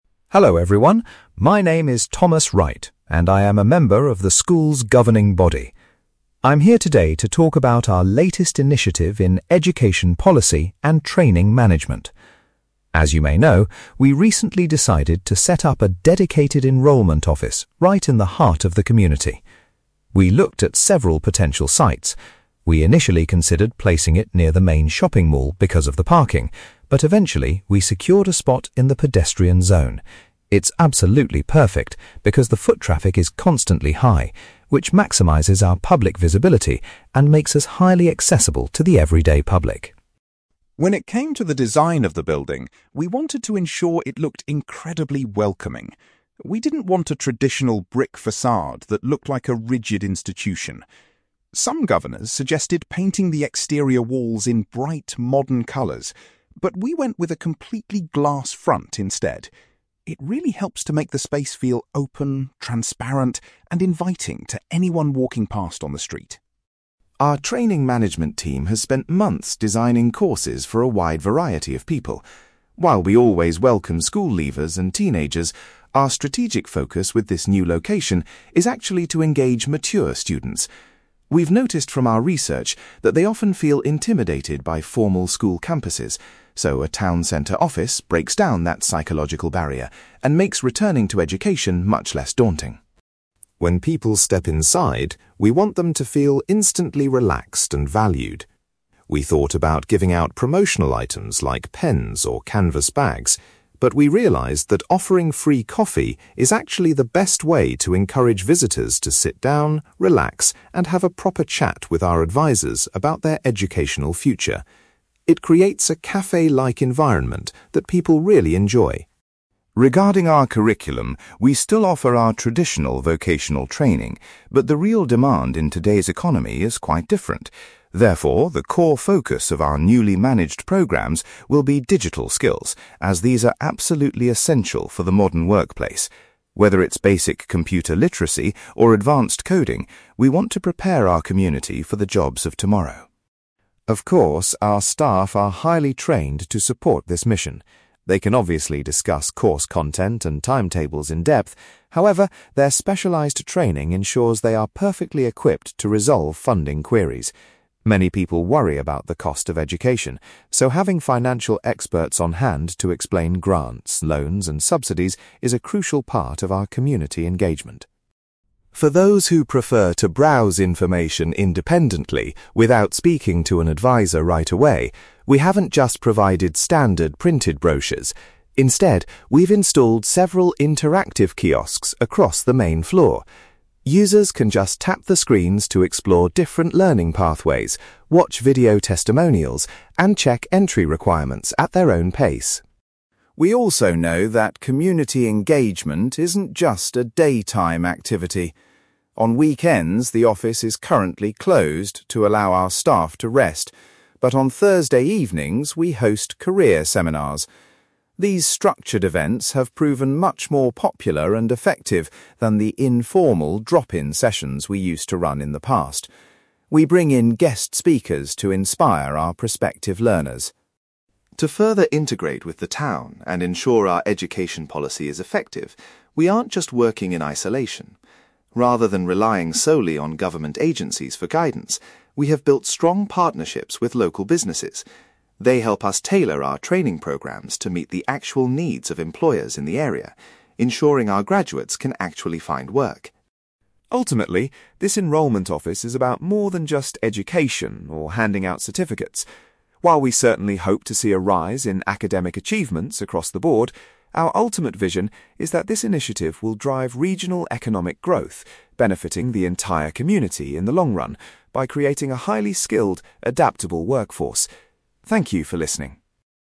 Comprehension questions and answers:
You will hear a school governor called Thomas Wright giving a presentation about a new town-centre enrolment office. For questions 9-18, complete the sentences with a word or short phrase.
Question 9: Thomas says the new office is located in the (9)........................... to ensure high visibility.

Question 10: The building was designed with a (10)........................... to create a welcoming atmosphere.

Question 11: The main target audience for this new town-centre location is (11)........................... .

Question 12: Visitors are provided with (12)........................... to make them feel comfortable enough to stay and talk.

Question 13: The newly managed training programs will heavily concentrate on teaching (13)........................... .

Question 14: The office staff are specially prepared to deal with (14)........................... from potential learners.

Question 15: People who want to find out about courses on their own can use the (15)........................... provided.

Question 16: Instead of weekend events, the office runs (16)........................... on Thursday nights.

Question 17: The school has collaborated with (17)........................... to ensure the training matches employer needs.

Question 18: Thomas believes the final result of this project will be a boost to the area's (18)........................... .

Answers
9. pedestrian zone
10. glass front
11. mature students
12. free coffee
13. digital skills
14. funding queries
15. interactive kiosks
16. career seminars
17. local businesses
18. economic growth

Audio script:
Thomas: Hello, everyone. My name is Thomas Wright, and I am a member of the school's governing body. I'm here today to talk about our latest initiative in education policy and training management. As you may know, we recently decided to set up a dedicated enrolment office right in the heart of the community. We looked at several potential sites. We initially considered placing it near the main shopping mall because of the parking, but eventually, we secured a spot in the pedestrian zone. It's absolutely perfect because the foot traffic is constantly high, which maximizes our public visibility and makes us highly accessible to the everyday public.
When it came to the design of the building, we wanted to ensure it looked incredibly welcoming. We didn't want a traditional brick facade that looked like a rigid institution. Some governors suggested painting the exterior walls in bright, modern colours, but we went with a completely glass front instead. It really helps to make the space feel open, transparent, and inviting to anyone walking past on the street.
Our training management team has spent months designing courses for a wide variety of people. While we always welcome school leavers and teenagers, our strategic focus with this new location is actually to engage mature students. We've noticed from our research that they often feel intimidated by formal school campuses, so a town-centre office breaks down that psychological barrier and makes returning to education much less daunting.
When people step inside, we want them to feel instantly relaxed and valued. We thought about giving out promotional items like pens or canvas bags, but we realised that offering free coffee is actually the best way to encourage visitors to sit down, relax, and have a proper chat with our advisors about their educational future. It creates a café-like environment that people really enjoy.
Regarding our curriculum, we still offer our traditional vocational training, but the real demand in today's economy is quite different. Therefore, the core focus of our newly managed programs will be digital skills, as these are absolutely essential for the modern workplace. Whether it's basic computer literacy or advanced coding, we want to prepare our community for the jobs of tomorrow.
Of course, our staff are highly trained to support this mission. They can obviously discuss course content and timetables in depth; however, their specialized training ensures they are perfectly equipped to resolve funding queries. Many people worry about the cost of education, so having financial experts on hand to explain grants, loans, and subsidies is a crucial part of our community engagement.
For those who prefer to browse information independently without speaking to an advisor right away, we haven't just provided standard printed brochures. Instead, we've installed several interactive kiosks across the main floor. Users can just tap the screens to explore different learning pathways, watch video testimonials, and check entry requirements at their own pace.
We also know that community engagement isn't just a daytime activity. On weekends, the office is currently closed to allow our staff to rest, but on Thursday evenings, we host career seminars. These structured events have proven much more popular and effective than the informal drop-in sessions we used to run in the past. We bring in guest speakers to inspire our prospective learners.
To further integrate with the town and ensure our education policy is effective, we aren't just working in isolation. Rather than relying solely on government agencies for guidance, we have built strong partnerships with local businesses. They help us tailor our training programs to meet the actual needs of employers in the area, ensuring our graduates can actually find work.
Ultimately, this enrolment office is about more than just education or handing out certificates. While we certainly hope to see a rise in academic achievements across the board, our ultimate vision is that this initiative will drive regional economic growth, benefiting the entire community in the long run by creating a highly skilled, adaptable workforce. Thank you for listening.

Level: B2